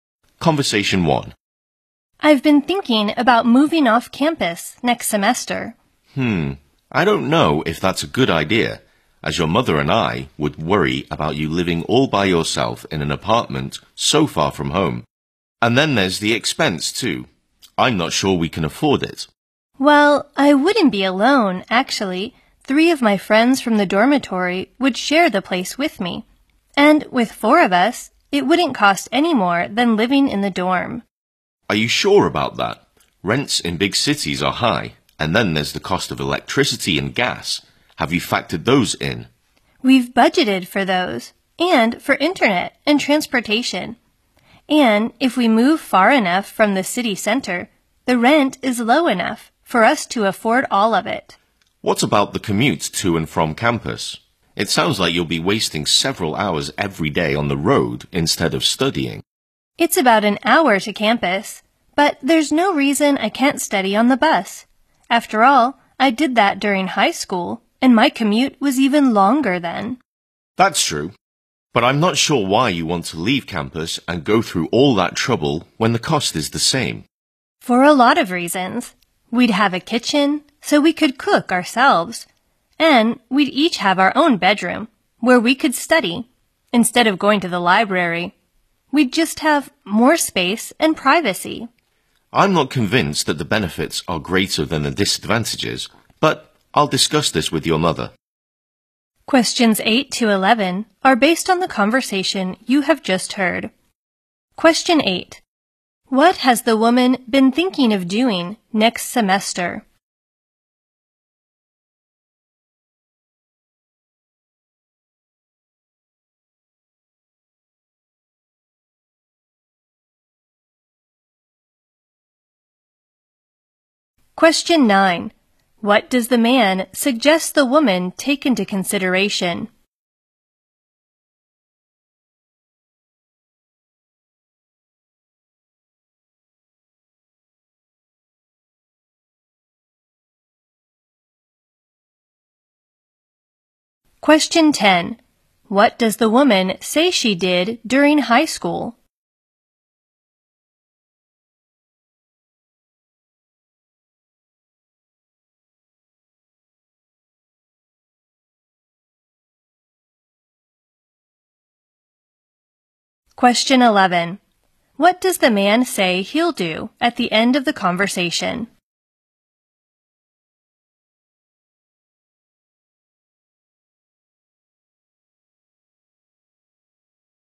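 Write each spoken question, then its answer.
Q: What has the woman been thinking of doing next semester?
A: Moving off campus

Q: What does the man suggest the woman take into consideration?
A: The cost of electricity and gas

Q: What does the woman say she did during high school?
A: She studied on the bus during a long commute

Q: What does the man say he'll do at the end of the conversation?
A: Discuss it with her mother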